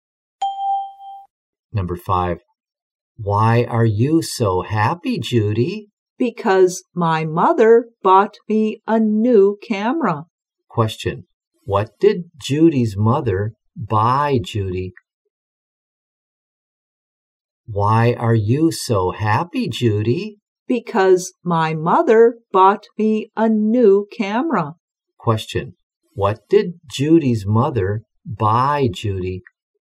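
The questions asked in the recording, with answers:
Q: What did Judy's mother buy, Judy?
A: A new camera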